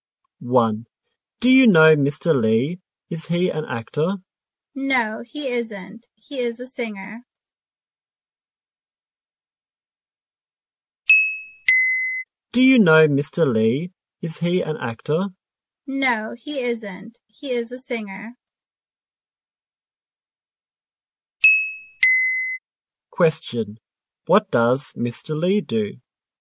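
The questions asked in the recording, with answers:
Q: What does Mr. Lee do?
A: He is a singer.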